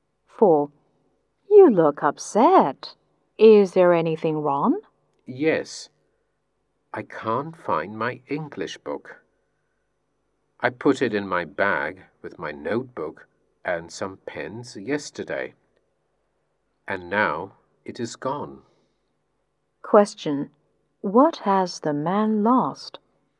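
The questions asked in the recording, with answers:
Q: Question, what has the man lost?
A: His English book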